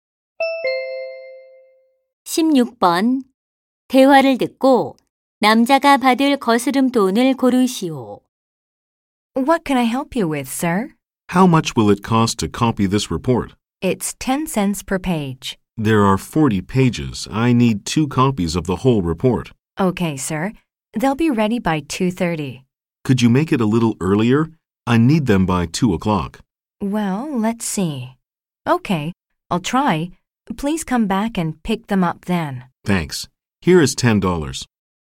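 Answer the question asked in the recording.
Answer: 2달러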